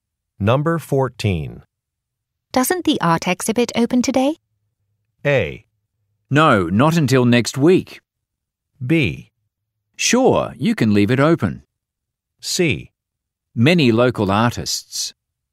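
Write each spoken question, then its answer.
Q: Doesn't the art exhibit open today?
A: A: No, not until next week.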